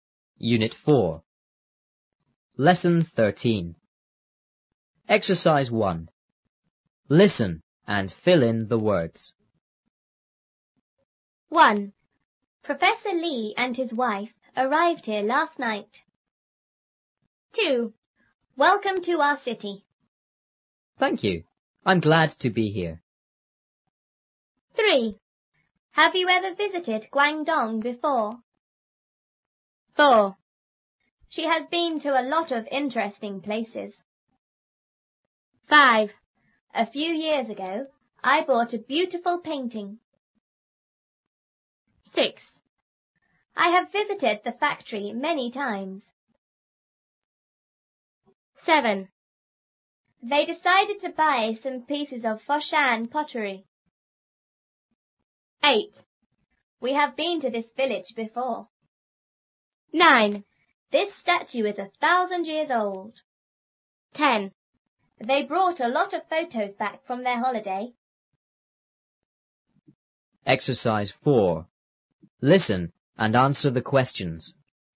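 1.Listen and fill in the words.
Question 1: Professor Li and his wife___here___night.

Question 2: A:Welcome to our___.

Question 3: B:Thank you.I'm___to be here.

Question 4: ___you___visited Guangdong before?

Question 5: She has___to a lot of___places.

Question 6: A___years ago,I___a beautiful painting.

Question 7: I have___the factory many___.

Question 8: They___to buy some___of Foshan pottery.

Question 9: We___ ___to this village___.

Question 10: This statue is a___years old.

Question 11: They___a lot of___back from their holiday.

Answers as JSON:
{"1": "arrived; last", "2": "city", "3": "glad", "4": "Have; ever", "5": "been; interesting", "6": "few; bought", "7": "visited; times", "8": "decided; pieces", "9": "have been; before", "10": "thousand", "11": "brought; photos"}

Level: 初中英语广州版3B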